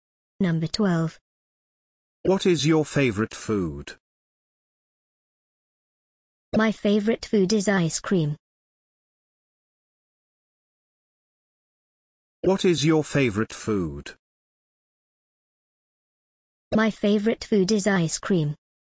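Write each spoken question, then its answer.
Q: What is your favorite food?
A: Ice cream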